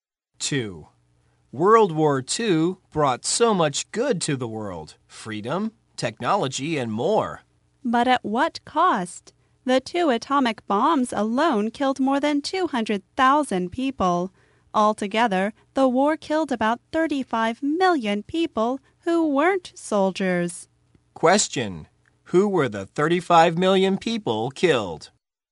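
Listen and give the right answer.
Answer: People who weren't soldiers (civilians)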